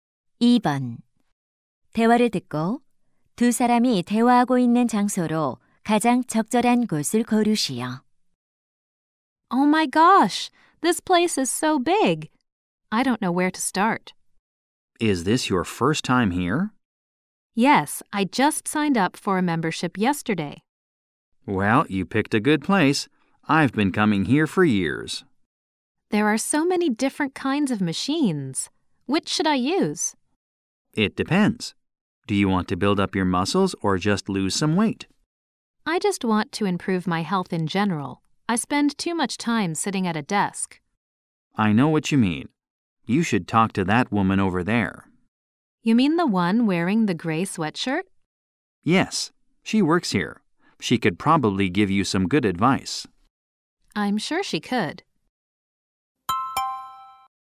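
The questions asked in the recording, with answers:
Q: 대화를 듣고 두 사람이 대화하고 있는 장소로 가장 적절한 곳을 고르시오.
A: 헬스장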